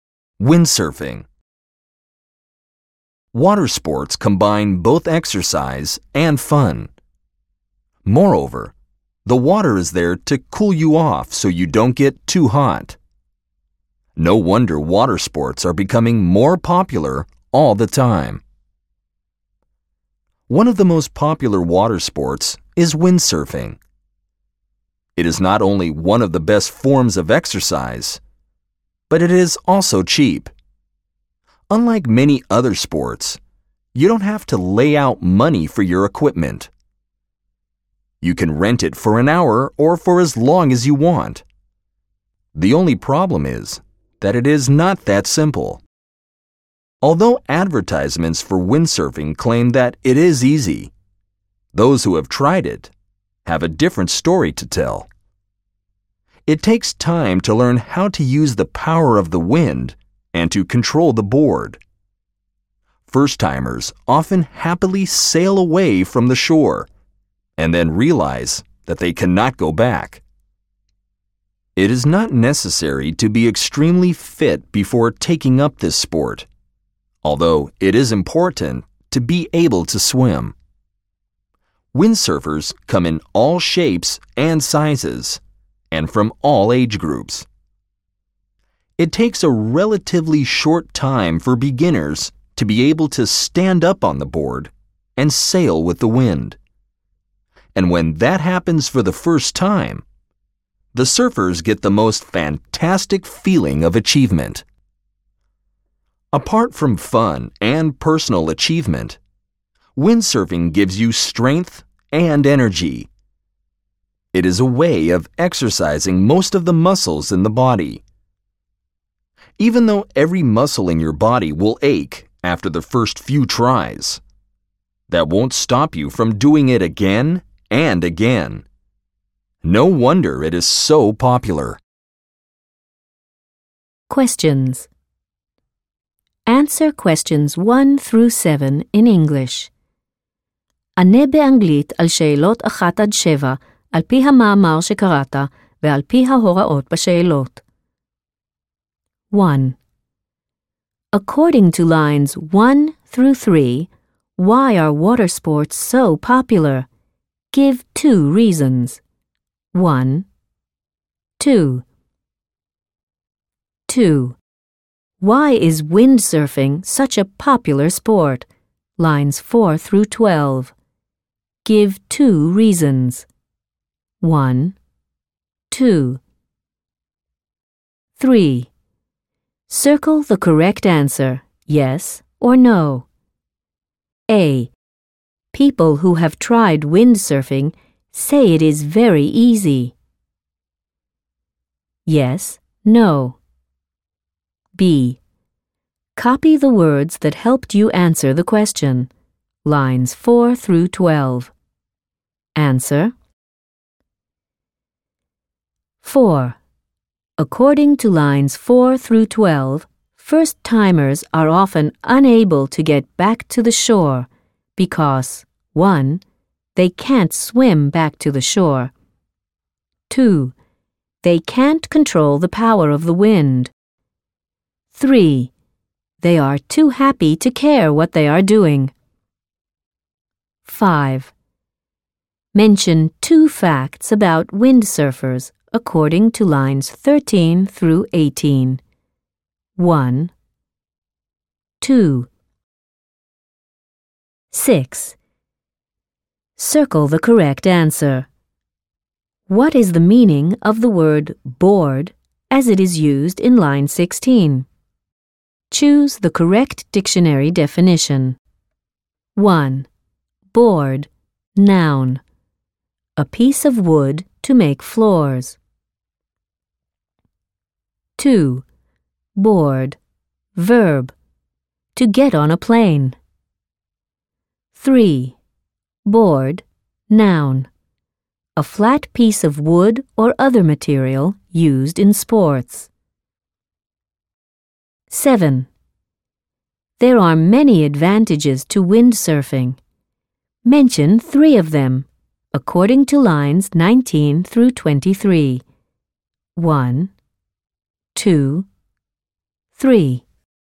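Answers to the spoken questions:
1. They combine exercise and fun; the water cools you off so you don't get too hot
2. It is one of the best forms of exercise; it is cheap (you can rent the equipment)
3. No
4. those who have tried it have a different story to tell
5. 2: They can't control the power of the wind.
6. They come in all shapes and sizes and from all age groups; beginners learn to stand up and sail in a relatively short time
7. 3: Board, noun. A flat piece of wood or other material used in sports.
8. Fun, a feeling of personal achievement, strength and energy (exercises most muscles)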